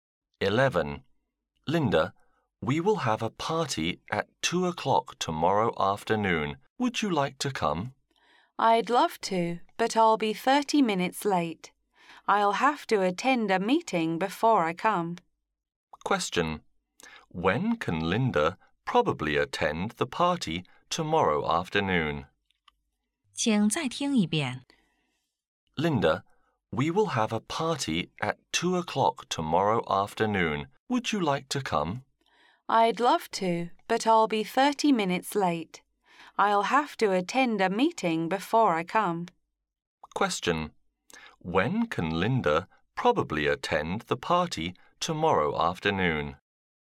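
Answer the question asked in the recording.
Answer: At 2:30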